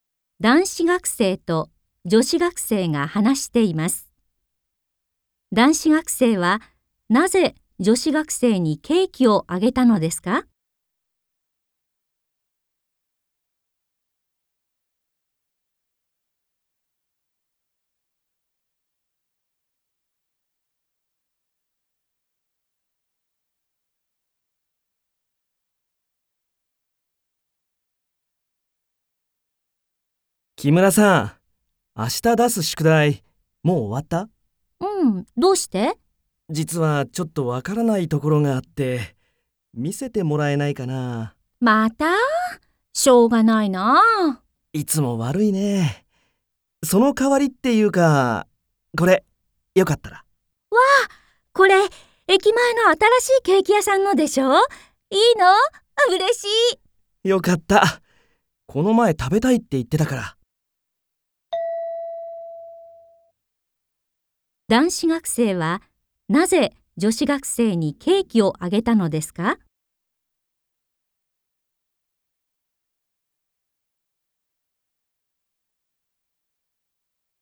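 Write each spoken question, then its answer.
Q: 男子学生はなぜ女子学生にケーキをあげたのですか?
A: 宿題を見せてもらうお礼として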